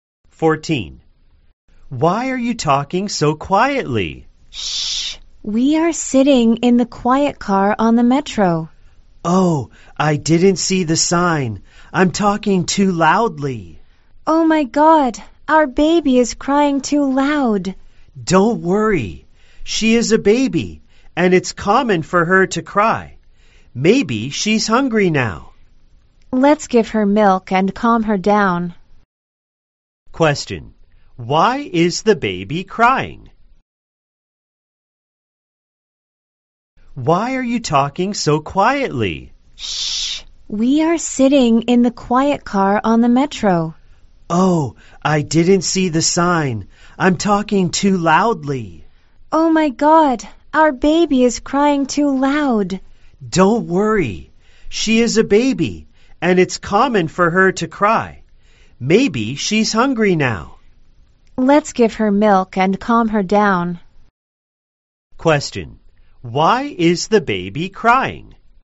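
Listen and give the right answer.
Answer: Maybe she's hungry.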